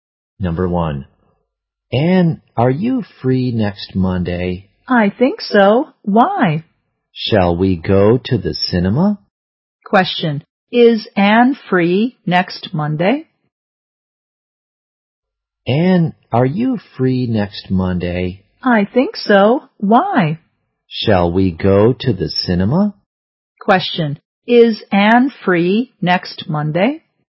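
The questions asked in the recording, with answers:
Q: Is Ann free next Monday?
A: Yes, she thinks so.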